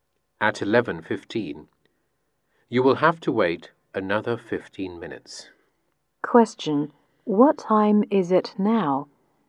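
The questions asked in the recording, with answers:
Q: What time is it now?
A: 11:00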